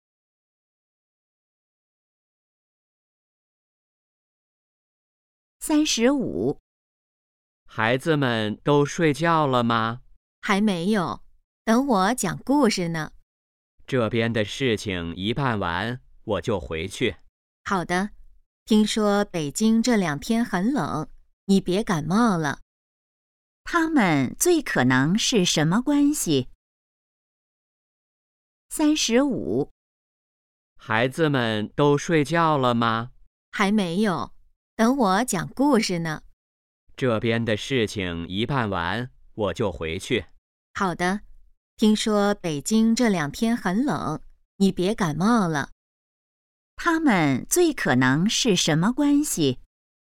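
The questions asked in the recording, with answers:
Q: 他们最可能是什么关系?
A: 夫妻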